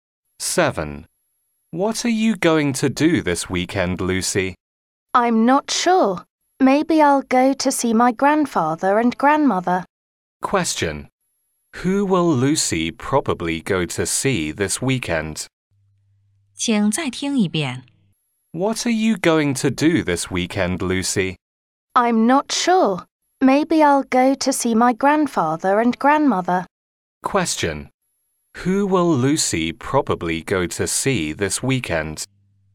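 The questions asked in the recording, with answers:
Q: Who will Lucy probably go to see this weekend?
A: Her grandparents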